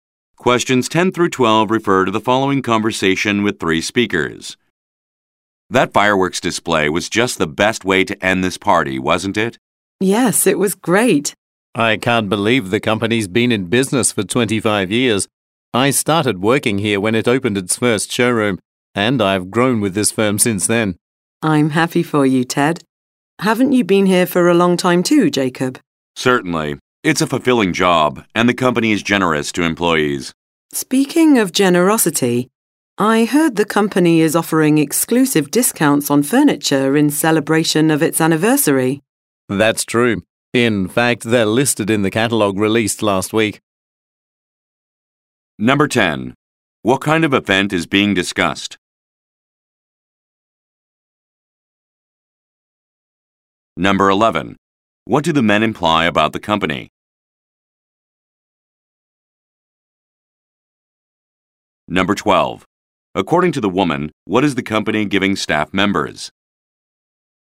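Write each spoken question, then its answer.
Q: What kind of event is being discussed?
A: A company anniversary party

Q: According to the woman, what is the company giving staff members?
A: Exclusive discounts on furniture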